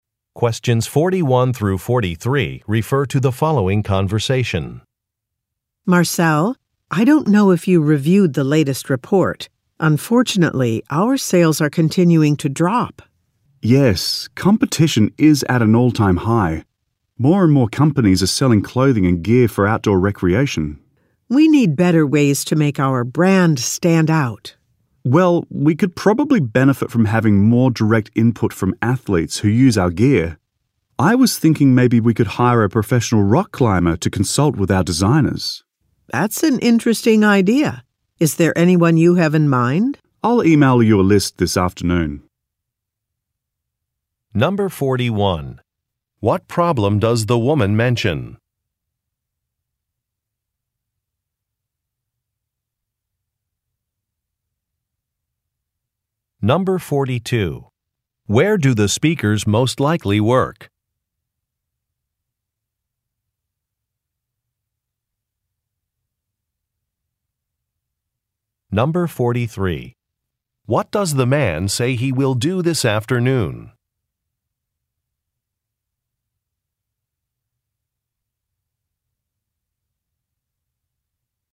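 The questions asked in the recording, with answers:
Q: What problem does the woman mention?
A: Sales are continuing to drop.

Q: Where do the speakers most likely work?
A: At an outdoor clothing and gear company.

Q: What does the man say he will do this afternoon?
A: Email a list of possible athletes (rock climbers).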